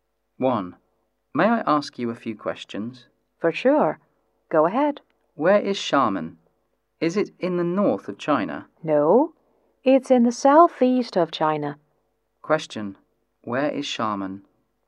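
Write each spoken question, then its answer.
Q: Where is Xiamen?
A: In the southeast of China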